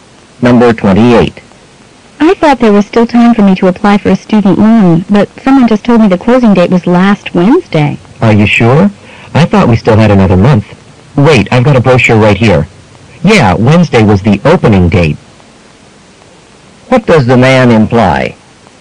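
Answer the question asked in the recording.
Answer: The woman can still apply for the loan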